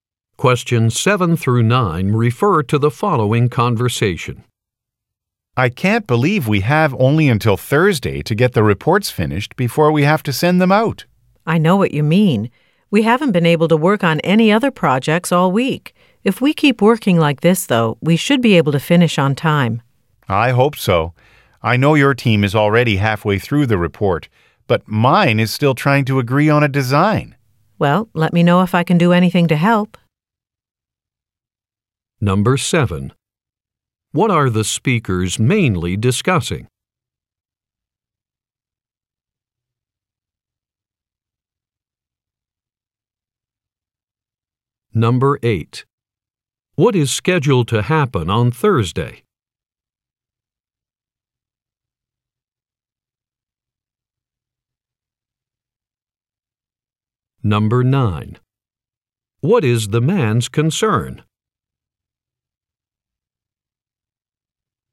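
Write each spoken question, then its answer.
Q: What are the speakers mainly discussing?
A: Finishing reports before a deadline

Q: What is scheduled to happen on Thursday?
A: The reports must be sent out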